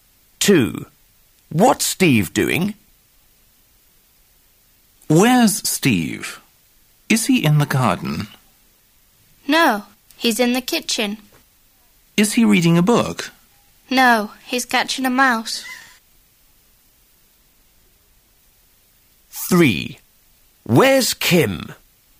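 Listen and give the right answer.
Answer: Catching a mouse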